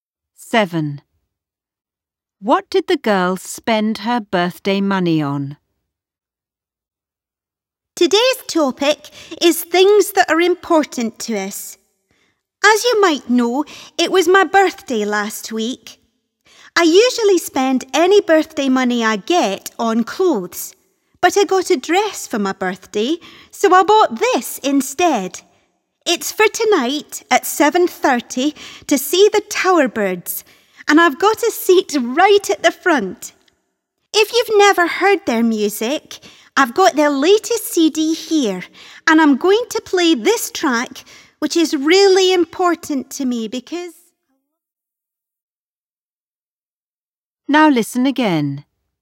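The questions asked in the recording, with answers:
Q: What did the girl spend her birthday money on?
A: A concert ticket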